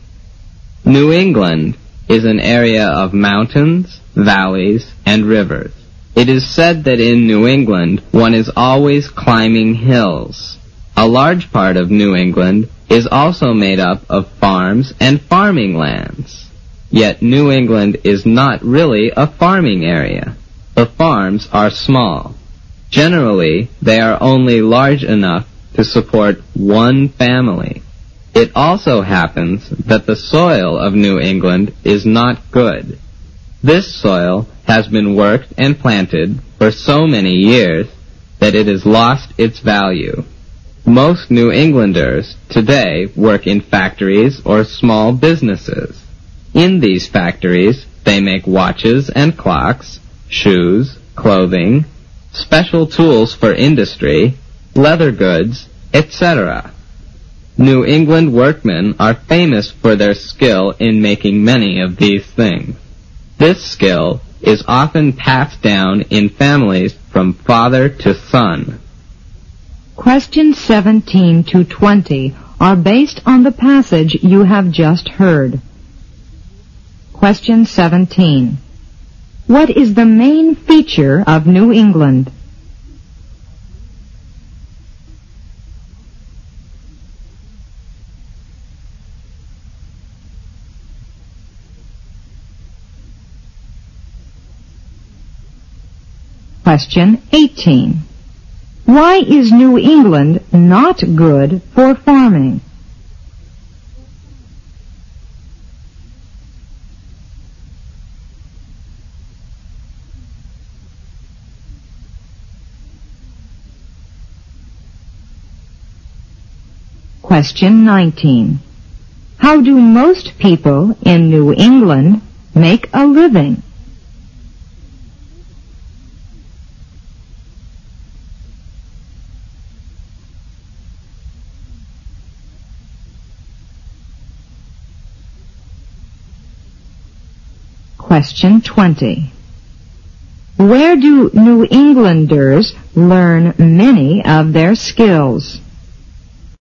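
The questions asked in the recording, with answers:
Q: Why is New England not good for farming?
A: The farms are small and the soil has lost its value from years of use.

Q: How do most people in New England make a living?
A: They work in factories or small businesses.

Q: Where do New Englanders learn many of their skills?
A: In their families, passed down from father to son.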